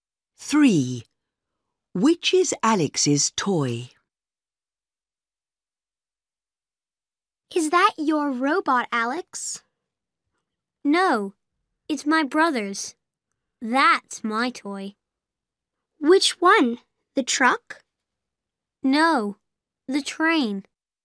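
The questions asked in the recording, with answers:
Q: Which is Alex's toy?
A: The train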